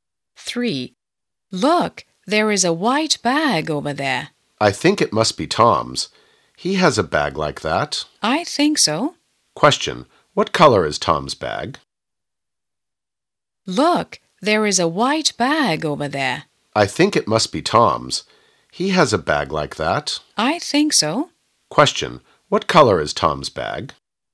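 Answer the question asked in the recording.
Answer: White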